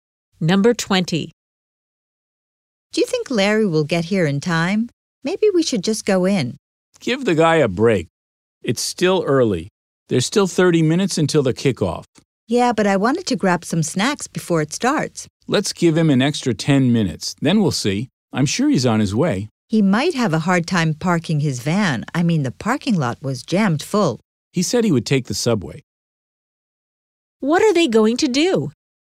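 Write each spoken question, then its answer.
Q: What are they going to do?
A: Wait 10 more minutes for Larry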